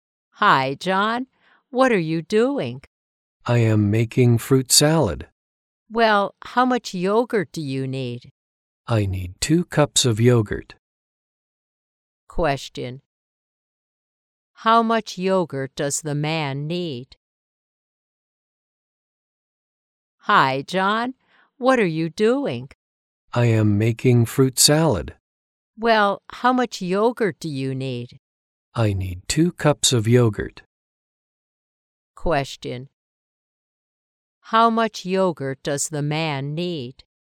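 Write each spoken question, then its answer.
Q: How much yogurt does the man need?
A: 2 cups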